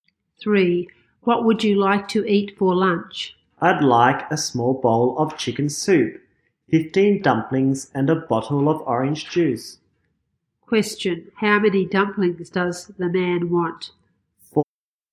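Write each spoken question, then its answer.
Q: How many dumplings does the man want?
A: 15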